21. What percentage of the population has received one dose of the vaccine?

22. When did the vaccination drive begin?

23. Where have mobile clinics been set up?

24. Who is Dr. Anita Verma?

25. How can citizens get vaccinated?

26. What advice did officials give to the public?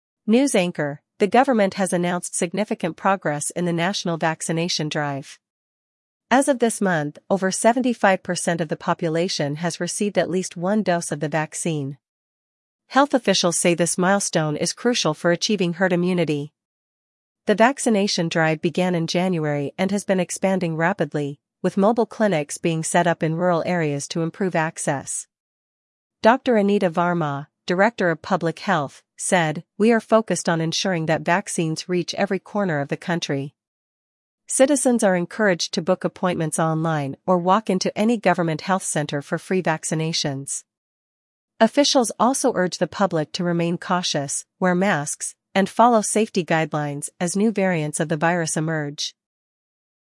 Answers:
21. 75%
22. January
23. Rural areas
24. Director of Public Health
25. Book online or walk in
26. Stay cautious and wear masks

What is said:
News Anchor: The government has announced significant progress in the National Vaccination Drive. As of this month, over 75% of the population has received at least one dose of the vaccine. Health officials say this milestone is crucial for achieving herd immunity.
The vaccination drive began in January and has been expanding rapidly, with mobile clinics being set up in rural areas to improve access. Dr. Anita Verma, Director of Public Health, said, "We are focused on ensuring that vaccines reach every corner of the country."
Citizens are encouraged to book appointments online or walk into any government health center for free vaccinations. Officials also urge the public to remain cautious, wear masks, and follow safety guidelines as new variants of the virus emerge.